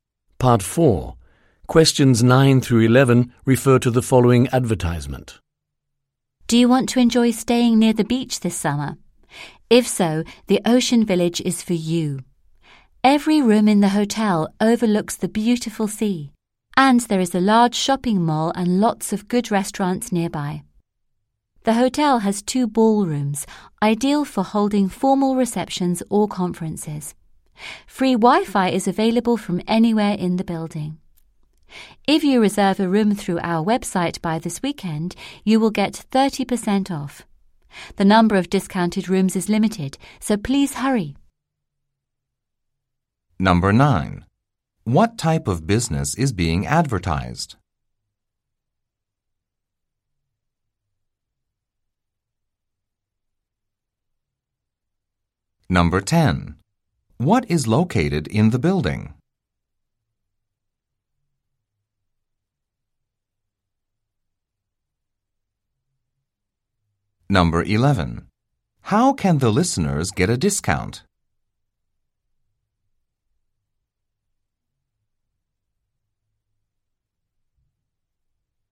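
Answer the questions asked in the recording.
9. A hotel
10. Two ballrooms
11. By reserving a room through the website by this weekend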